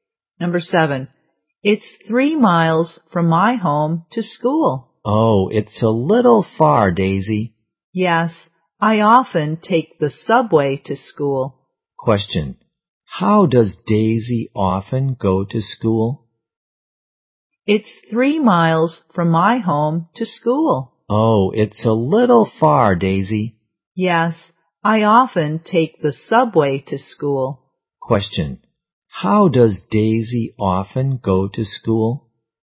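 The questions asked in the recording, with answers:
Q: Question,How does Daisy often go to school?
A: By subway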